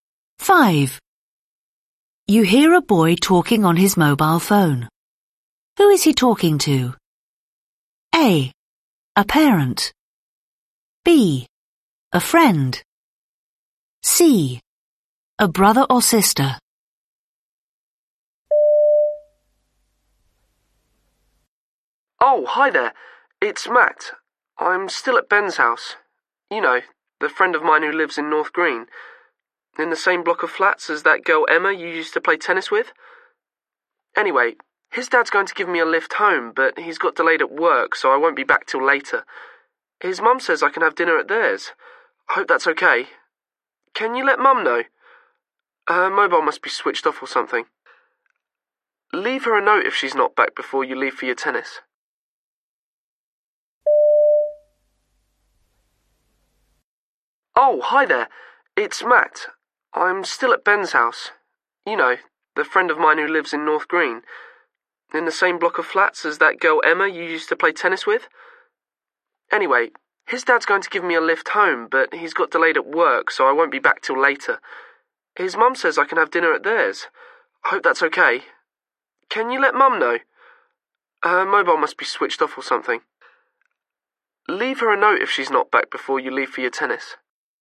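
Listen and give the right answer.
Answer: C: A brother or sister.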